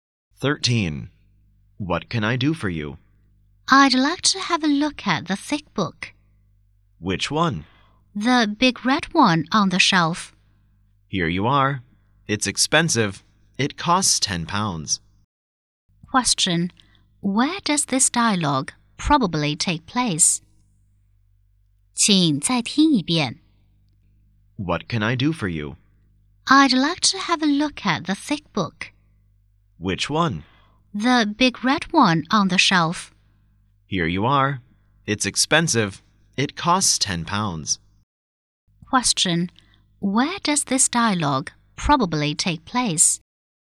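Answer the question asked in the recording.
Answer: In a bookshop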